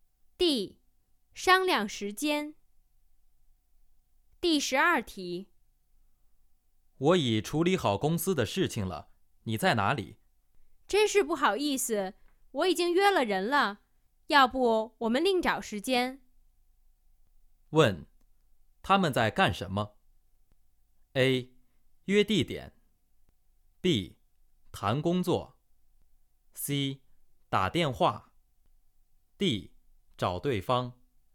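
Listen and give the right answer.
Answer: C: 打电话。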